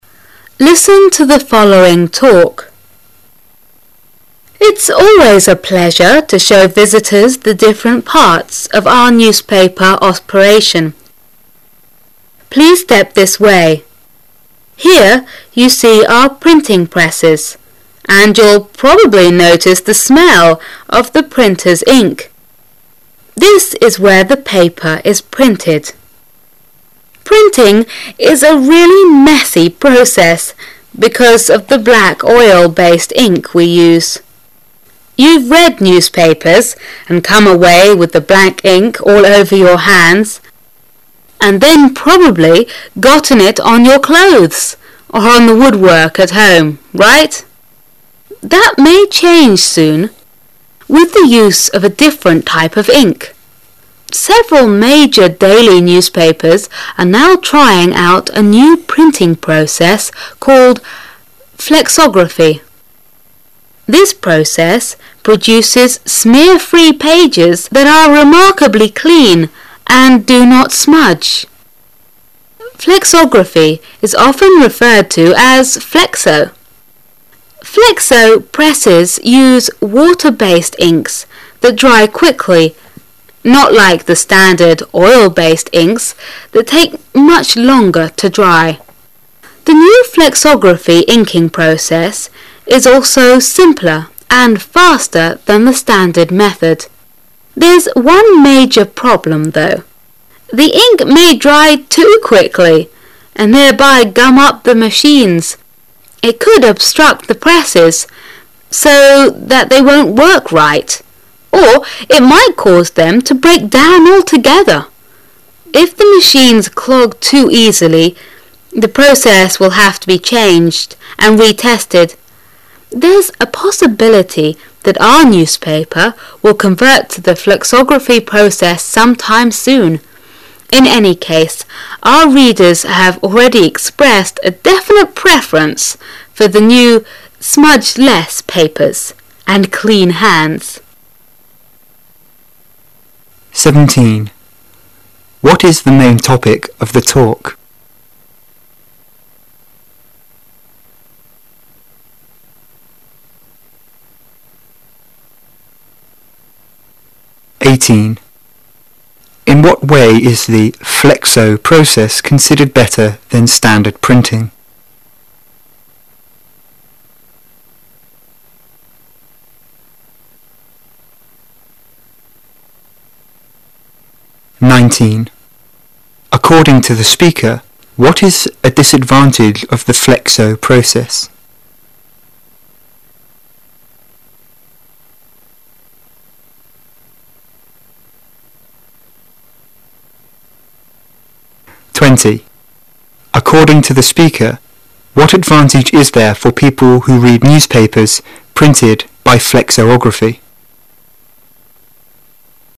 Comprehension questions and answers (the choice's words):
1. In what way is the "flexo" process considered better than standard printing?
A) The newspapers remain thin and flexible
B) The presses can print larger sheets of paper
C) The ink is fast-drying and clean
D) The ink can be changed and retested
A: The ink is fast-drying and clean

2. According to the speaker, what is a disadvantage of the "flexo" process?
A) Presses may be clogged with ink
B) Papers get smudged with old ink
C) Reporters prefer the standard method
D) Machines may need to be oiled daily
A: Presses may be clogged with ink

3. According to the speaker, what advantage is there for people who read newspapers printed by flexography?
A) Large print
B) Smooth pages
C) Pleasant smells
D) Clean hands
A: Clean hands

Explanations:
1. 隐含细节题,由第一段最后一句话可以推出答案。
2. 隐含细节题。由第三段第四句话可知答案。
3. 明示细节题。由第二段最后一句可得答案。

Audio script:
Its always a pleasure to show visitors the different parts of our newspaper operation. Please step this way. Here you see our printing presses, and you'll probably notice the smell of the printer's ink This is where the pa per is printed. Printing is a really messy process because of the black, oil - based ink we use. You've read news papers and come away with the black ink all over your hands, and then probably got, it on your clothes or on the woodwork at home, fight? That may change soon, with the use of a different type of ink. Several major daily newspapers are now trying out a new printing process called 'flexography'. This process produces smear--free pages that are remarkably clean and do not smudge. Flexography is often referred to as "flexo". "Flexo" presses use water- based inks that dry quickly, not like the standard oil- based inks that take much longer to dry. The new flexography inking process is also simpler and faster than the standard method. There's one major problem, though. The ink may dry too quickly, and thereby gum up the machines. It could obstruct the pres scs, so that they won't work right, or it might cause them to break down altogether. If the machines clog too easily, the process will have to be changed and retested. There's a possibility that our newspaper will convert to the flexography process sometime soon. In any ease, our readers have already expressed a definite preference for the new smudge less papers, and dean bands. What is the main topic of the talk?